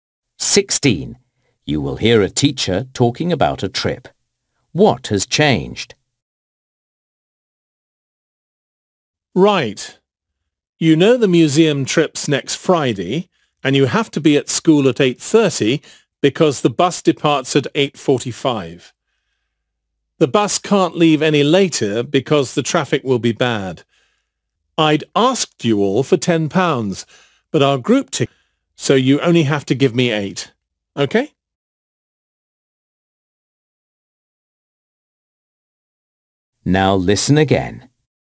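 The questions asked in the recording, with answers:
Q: What has changed?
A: The cost: it is now £8 instead of £10.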